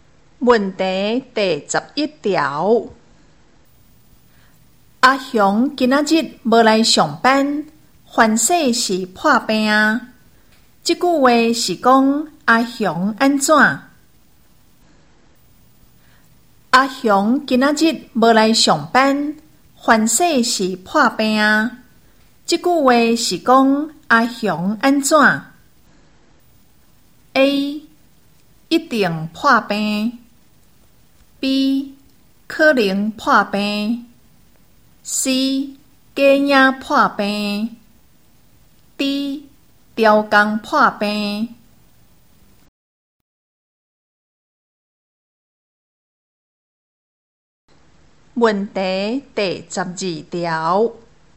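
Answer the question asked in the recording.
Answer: B: 可能破病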